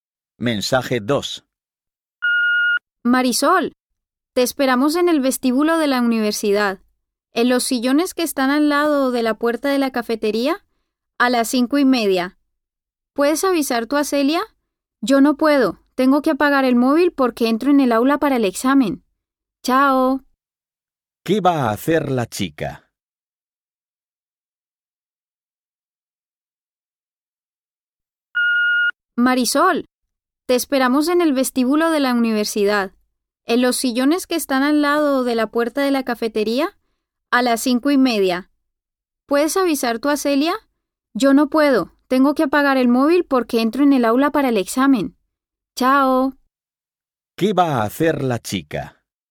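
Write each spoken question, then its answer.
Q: ¿Qué va a hacer la chica?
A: Hacer un examen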